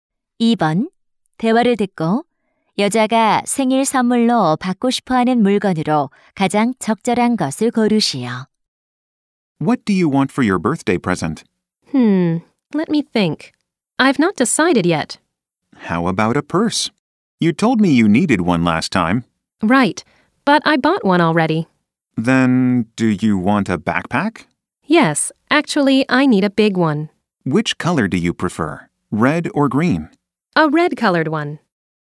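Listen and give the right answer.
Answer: 빨간색 큰 배낭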